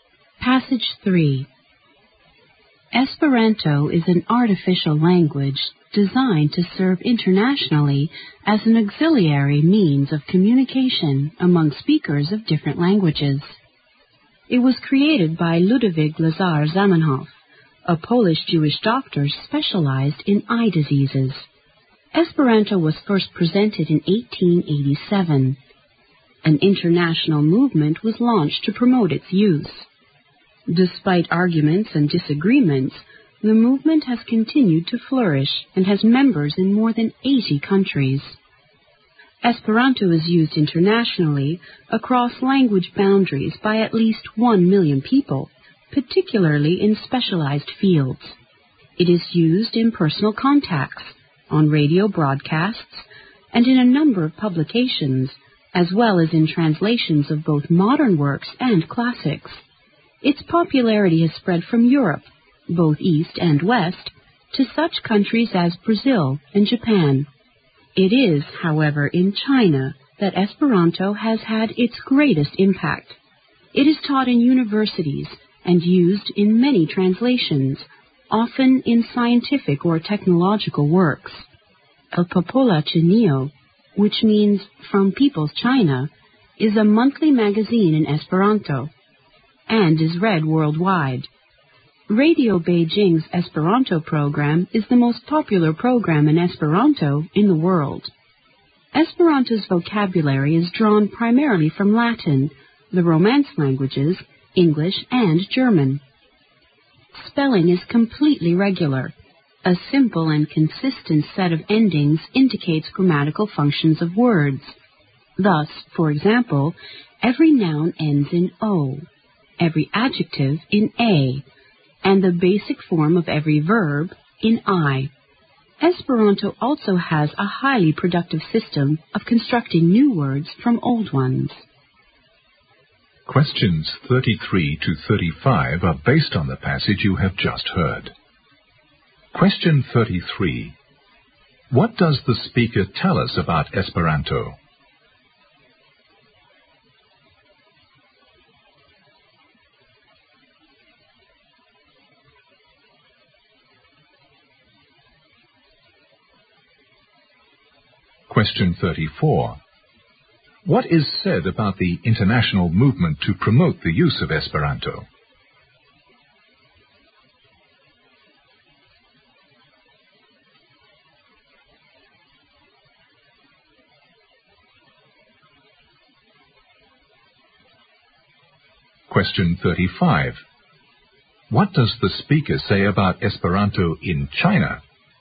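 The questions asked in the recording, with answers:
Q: What is said about the international movement to promote the use of Esperanto?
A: Despite disagreements, it has flourished and has members in more than 80 countries.

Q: What does the speaker say about Esperanto in China?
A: It has had its greatest impact in China.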